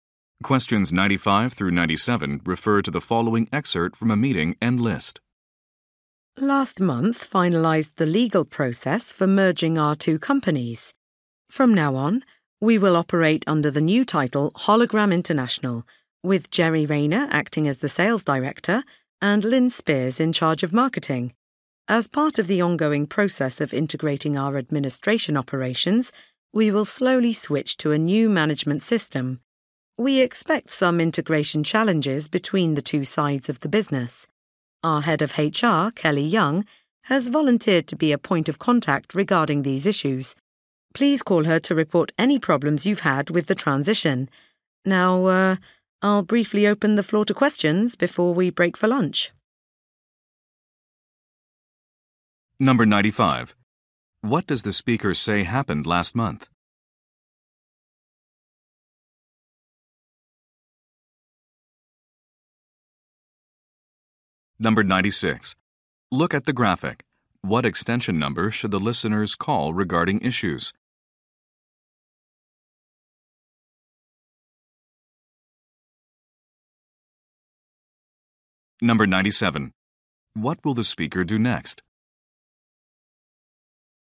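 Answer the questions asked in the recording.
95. Two companies completed a merger
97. Answer questions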